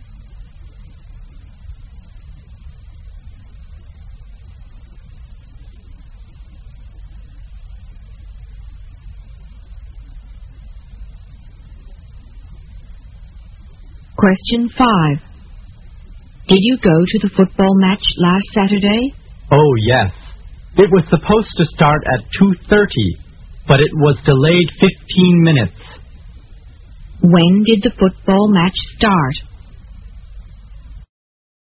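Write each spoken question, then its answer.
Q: When did the football match start?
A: At 2:45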